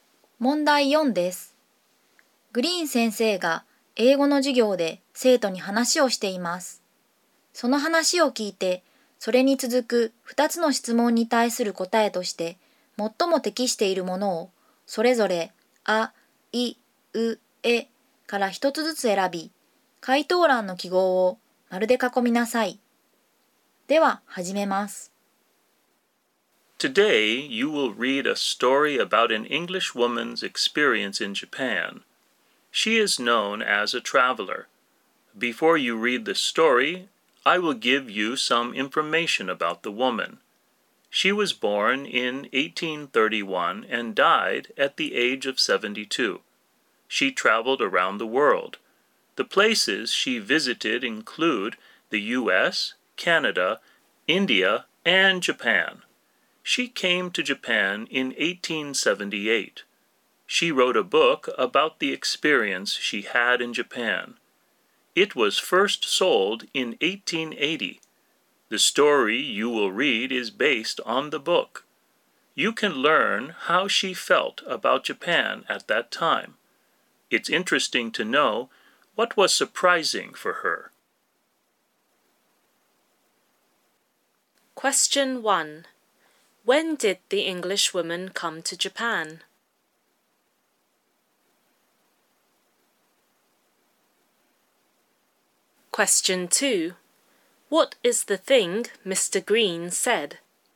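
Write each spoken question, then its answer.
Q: When did the English woman come to Japan?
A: In 1878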